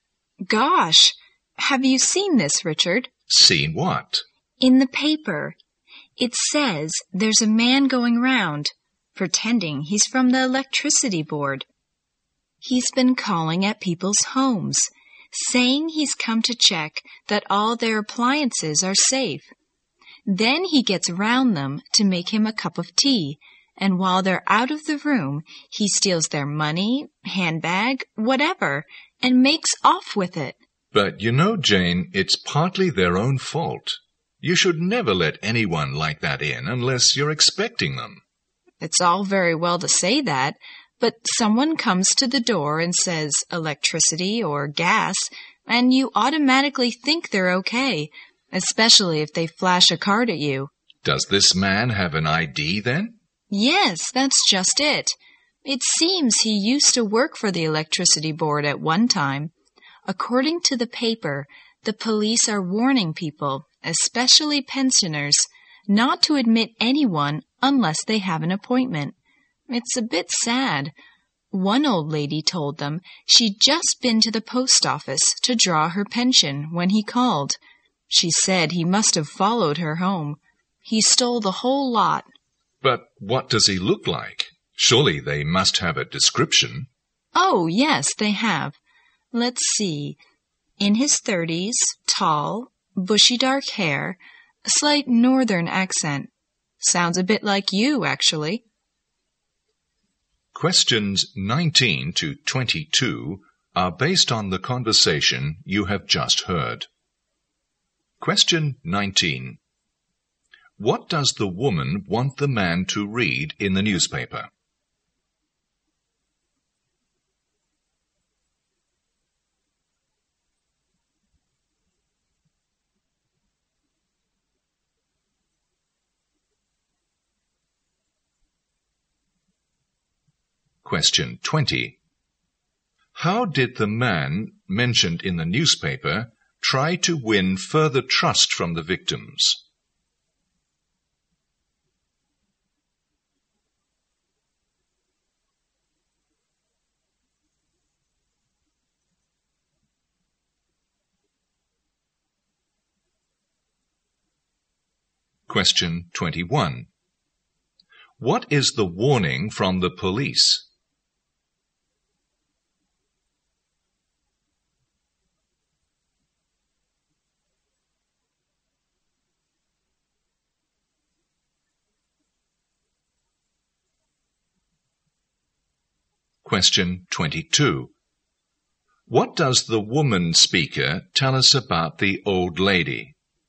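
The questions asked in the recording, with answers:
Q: What does the woman want the man to read in the newspaper?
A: A report about a man pretending to be from the electricity board to steal

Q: How did the man mentioned in the newspaper try to win further trust from the victims?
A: By showing an ID card

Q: What is the warning from the police?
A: Don't let anyone in unless they have an appointment

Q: What does the woman speaker tell us about the old lady?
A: She had all her pension stolen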